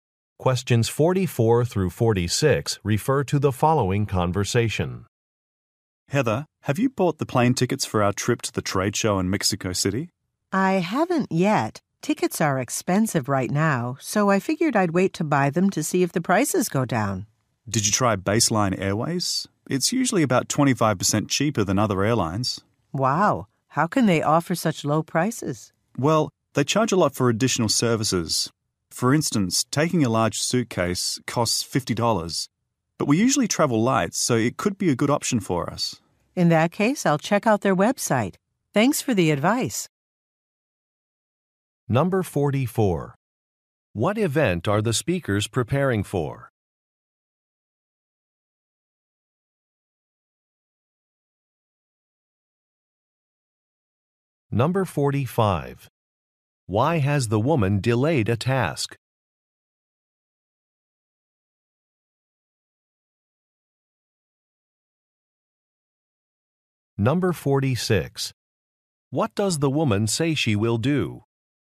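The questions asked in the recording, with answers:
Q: What event are the speakers preparing for?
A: A trade show in Mexico City

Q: Why has the woman delayed a task?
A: Tickets are expensive; she hopes prices go down

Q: What does the woman say she will do?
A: Check the Baseline Airways website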